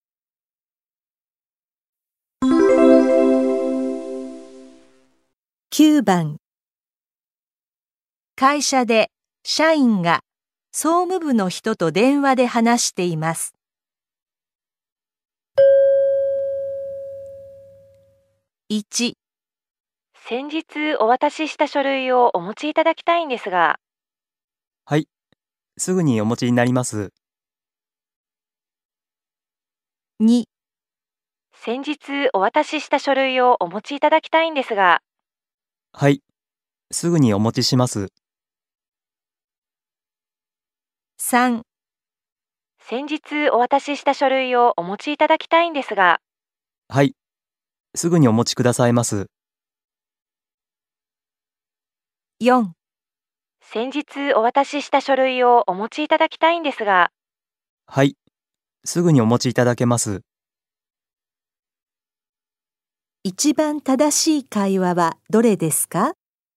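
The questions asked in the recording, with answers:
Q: 一番正しい会話はどれですか?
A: 2: はい、すぐにお持ちします。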